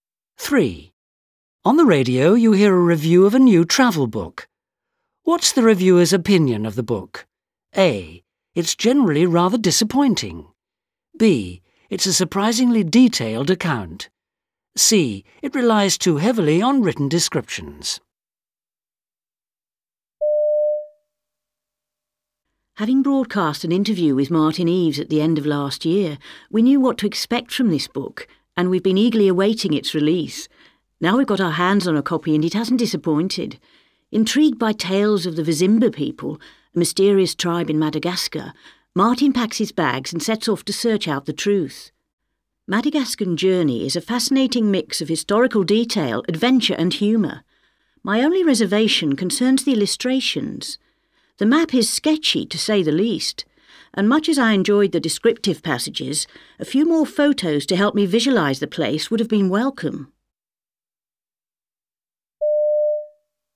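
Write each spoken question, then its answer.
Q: What's the reviewer's opinion of the book?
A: C: It relies too heavily on written descriptions.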